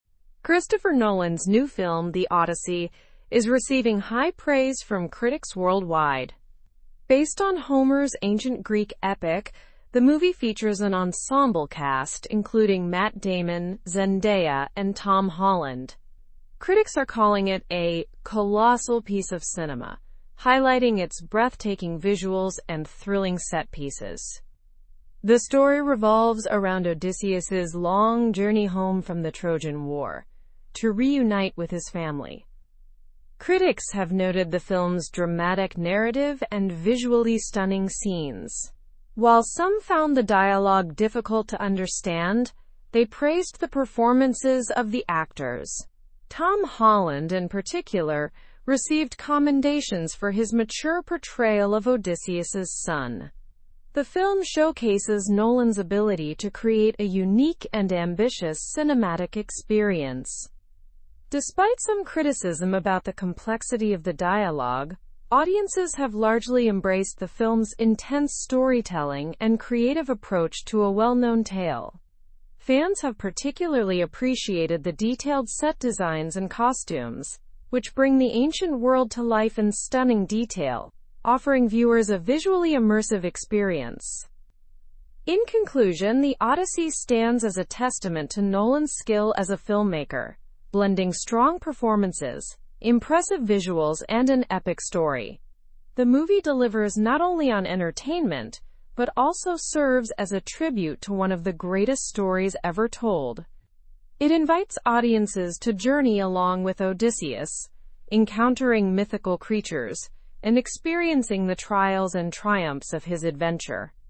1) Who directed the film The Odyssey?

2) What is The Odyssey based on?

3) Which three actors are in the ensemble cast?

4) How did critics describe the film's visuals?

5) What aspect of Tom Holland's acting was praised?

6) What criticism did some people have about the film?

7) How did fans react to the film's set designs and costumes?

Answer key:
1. Christopher Nolan directed the film.
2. It is based on Homer's ancient Greek epic.
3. Matt Damon, Zendaya, and Tom Holland are in the cast.
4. Critics described the visuals as breathtaking.
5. His mature portrayal of Odysseus's son was praised.
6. Some found the dialogue difficult to understand.
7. Fans appreciated the detailed set designs and costumes.

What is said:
Christopher Nolan's new film, The Odyssey, is receiving high praise from critics worldwide. Based on Homer's ancient Greek epic, the movie features an ensemble cast including Matt Damon, Zendaya, and Tom Holland. Critics are calling it a 'colossal piece of cinema', highlighting its breathtaking visuals and thrilling set pieces. The story revolves around Odysseus's long journey home from the Trojan War to reunite with his family.
Critics have noted the film's dramatic narrative and visually stunning scenes. While some found the dialogue difficult to understand, they praised the performances of the actors. Tom Holland, in particular, received commendations for his mature portrayal of Odysseus's son. The film showcases Nolan's ability to create a unique and ambitious cinematic experience.
Despite some criticism about the complexity of the dialogue, audiences have largely embraced the film's intense storytelling and creative approach to a well-known tale. Fans have particularly appreciated the detailed set designs and costumes, which bring the ancient world to life in stunning detail, offering viewers a visually immersive experience.
In conclusion, The Odyssey stands as a testament to Nolan's skill as a filmmaker, blending strong performances, impressive visuals, and an epic story. The movie delivers not only on entertainment but also serves as a tribute to one of the greatest stories ever told. It invites audiences to journey along with Odysseus, encountering mythical creatures and experiencing the trials and triumphs of his adventure.

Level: Level 3